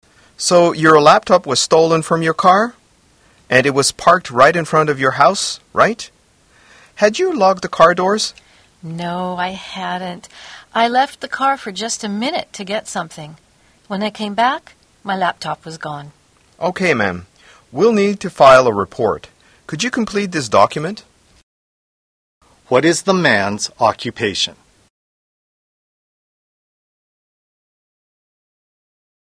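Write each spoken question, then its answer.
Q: What is the man's occupation?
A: Police officer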